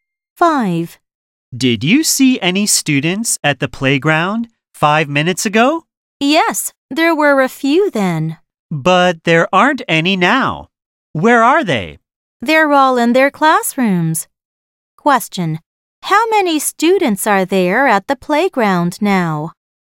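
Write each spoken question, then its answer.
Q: How many students are there at the playground now?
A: None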